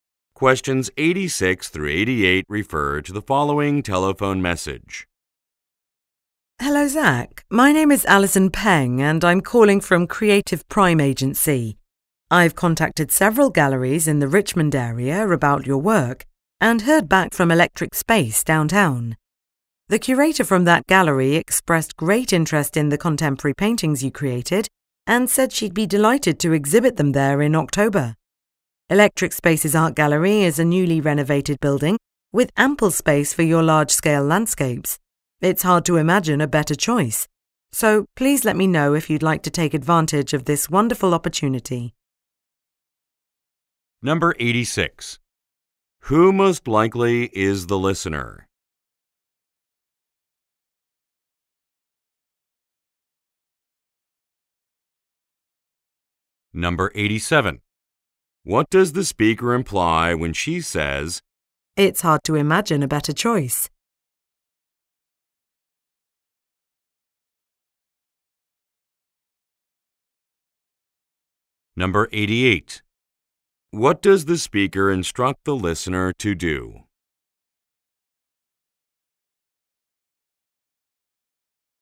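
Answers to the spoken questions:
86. A painter
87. The gallery is an ideal place to show his work
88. Let her know if he wants to take the opportunity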